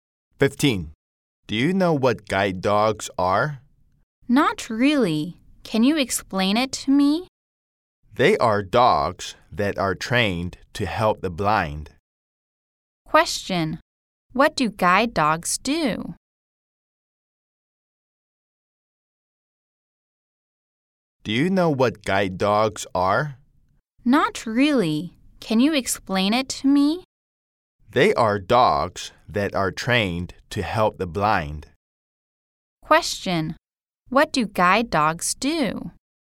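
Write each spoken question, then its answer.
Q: Question: What do guide dogs do?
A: They help blind people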